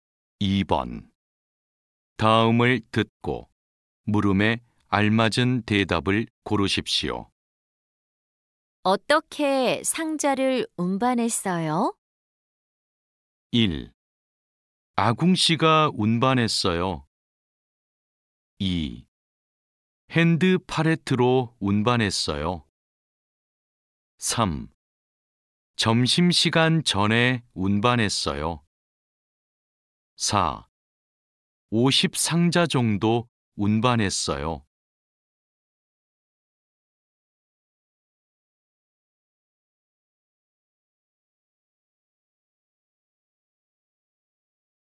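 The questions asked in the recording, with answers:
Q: 어떻게 상자를 운반했어요?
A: 2: 핸드 팔레트로 운반했어요.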